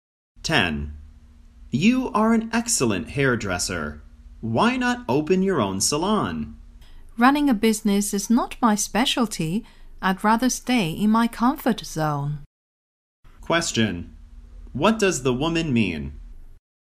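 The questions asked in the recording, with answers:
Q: What does the woman mean?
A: She doesn't want to open her own salon.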